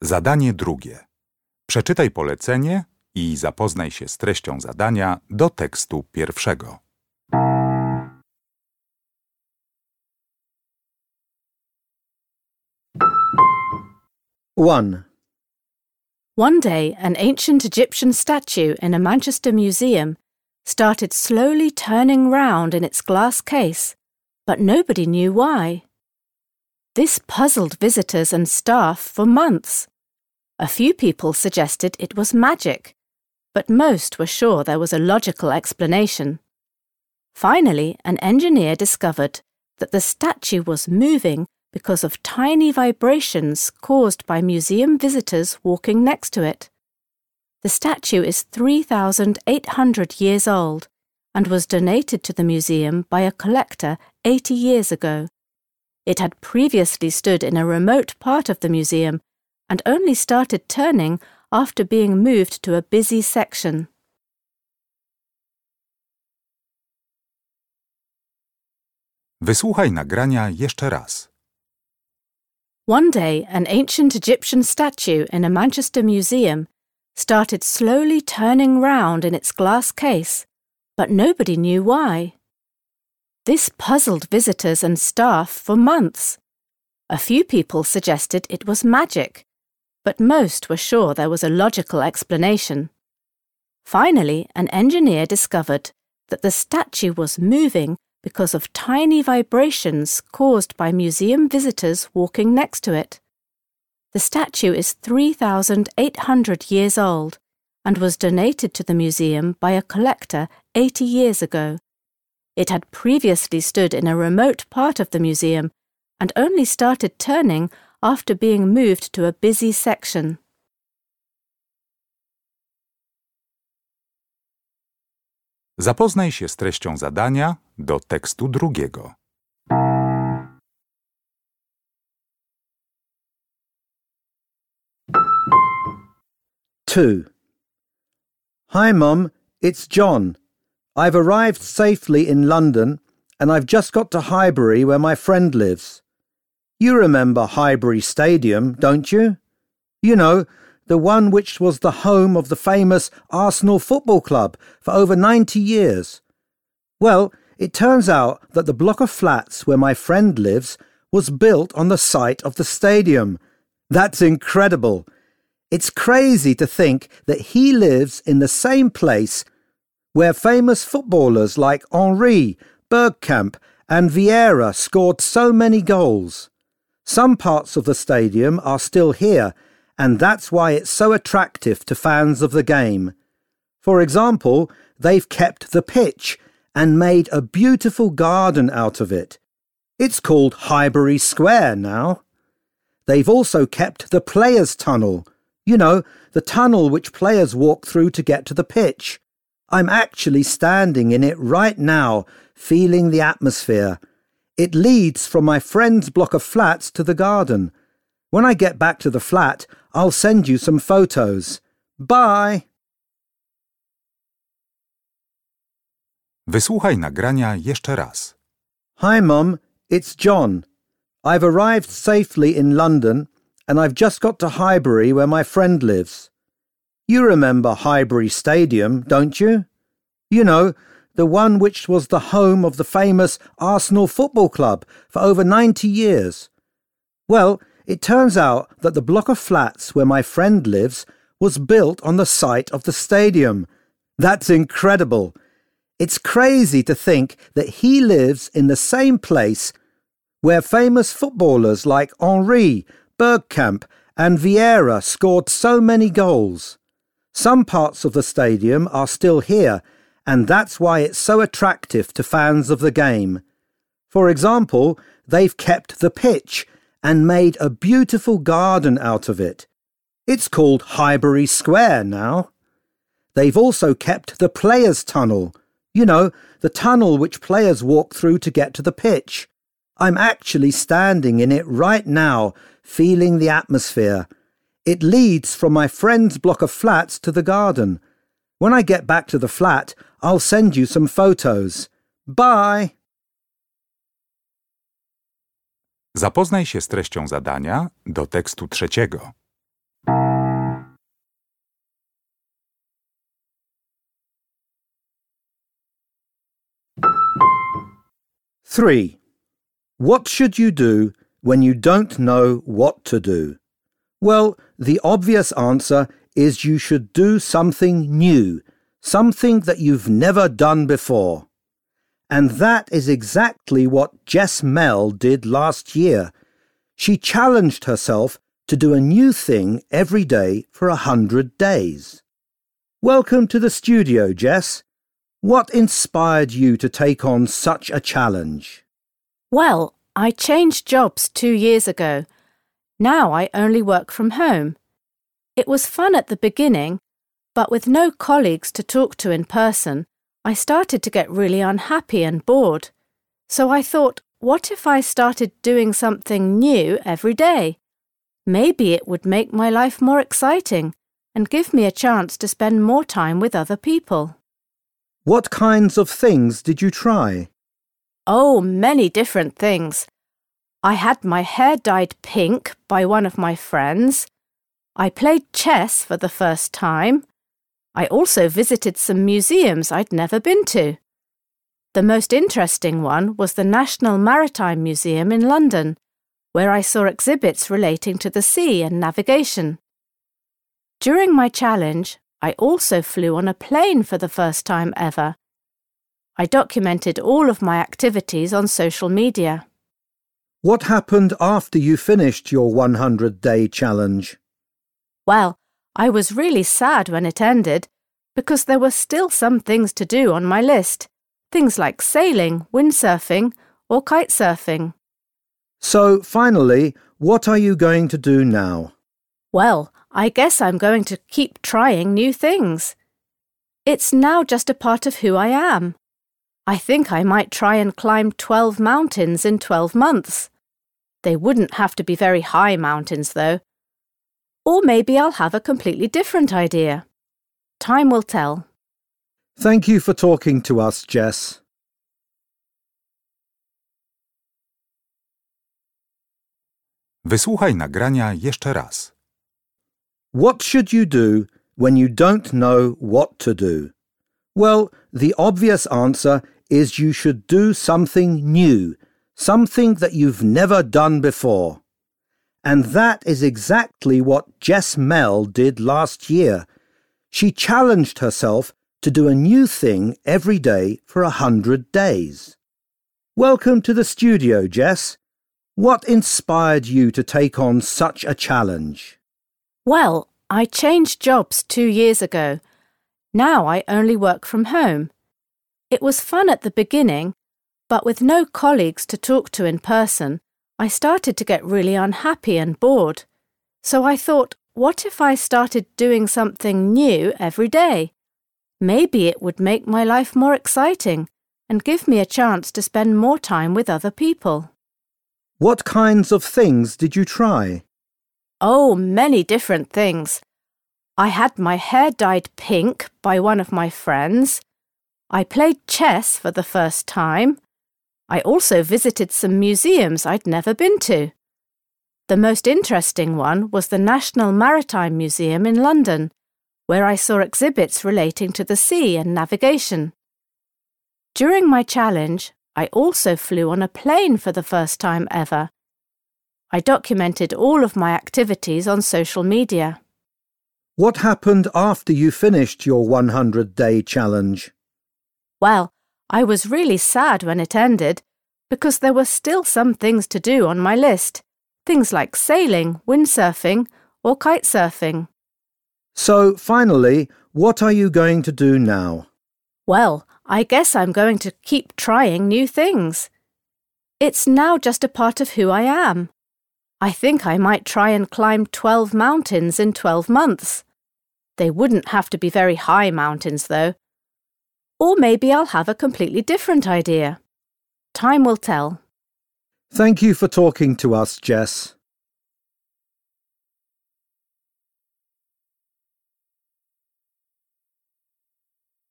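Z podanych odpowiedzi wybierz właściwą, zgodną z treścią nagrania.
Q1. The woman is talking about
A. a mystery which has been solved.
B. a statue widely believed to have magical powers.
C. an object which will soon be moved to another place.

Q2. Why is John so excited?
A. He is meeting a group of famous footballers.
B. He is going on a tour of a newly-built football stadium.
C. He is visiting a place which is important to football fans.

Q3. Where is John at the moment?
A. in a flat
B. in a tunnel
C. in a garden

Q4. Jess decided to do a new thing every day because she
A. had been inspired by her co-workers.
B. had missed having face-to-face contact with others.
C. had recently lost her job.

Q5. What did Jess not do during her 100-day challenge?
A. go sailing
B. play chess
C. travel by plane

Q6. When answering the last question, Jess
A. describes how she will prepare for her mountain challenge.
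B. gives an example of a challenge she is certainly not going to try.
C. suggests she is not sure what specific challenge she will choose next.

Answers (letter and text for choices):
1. A. a mystery which has been solved.
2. C. He is visiting a place which is important to football fans.
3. B. in a tunnel
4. B. had missed having face-to-face contact with others.
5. A. go sailing
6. C. suggests she is not sure what specific challenge she will choose next.

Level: Poziom: podstawowy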